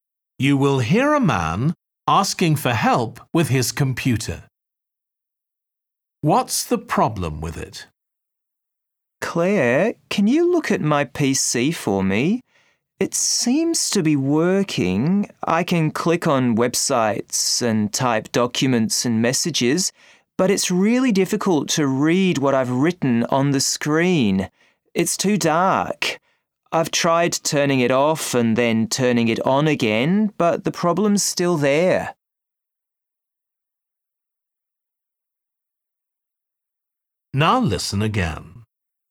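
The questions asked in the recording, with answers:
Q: What's the problem with it?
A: The screen is too dark to read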